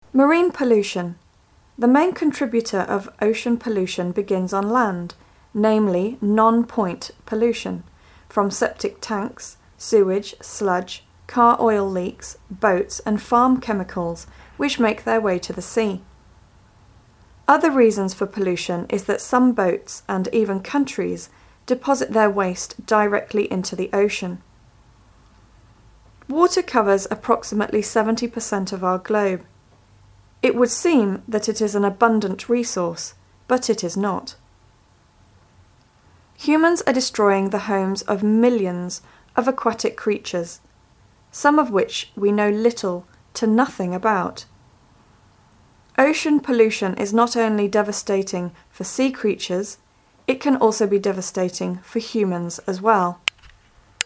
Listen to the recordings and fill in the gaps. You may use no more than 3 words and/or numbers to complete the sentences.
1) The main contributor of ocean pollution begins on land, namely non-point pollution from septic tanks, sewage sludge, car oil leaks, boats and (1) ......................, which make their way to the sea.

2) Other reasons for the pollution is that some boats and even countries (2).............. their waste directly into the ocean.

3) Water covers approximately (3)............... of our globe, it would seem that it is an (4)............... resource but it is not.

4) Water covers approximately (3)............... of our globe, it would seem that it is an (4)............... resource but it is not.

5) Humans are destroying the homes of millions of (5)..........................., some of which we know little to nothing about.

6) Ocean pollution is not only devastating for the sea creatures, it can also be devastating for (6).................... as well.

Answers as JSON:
{"1": "farm chemicals", "2": "deposit", "3": "70%", "4": "abundant", "5": "aquatic creatures", "6": "humans"}